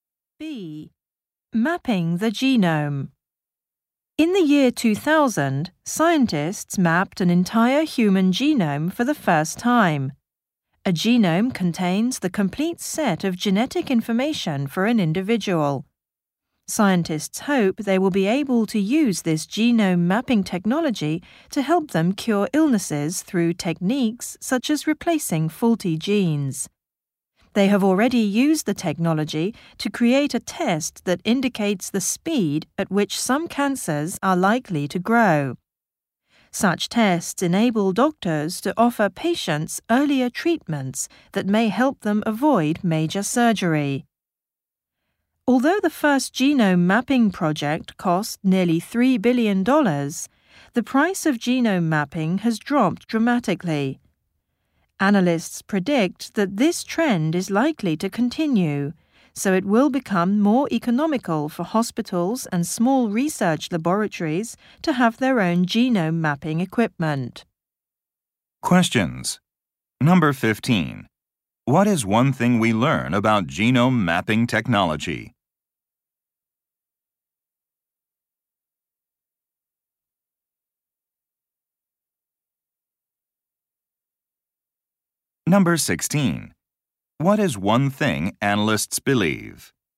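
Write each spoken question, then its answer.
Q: What is one thing we learn about genome mapping technology?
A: It has been used to create a test showing how fast some cancers are likely to grow.

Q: What is one thing analysts believe?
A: Genome mapping will become cheaper, so hospitals and small labs can have their own equipment.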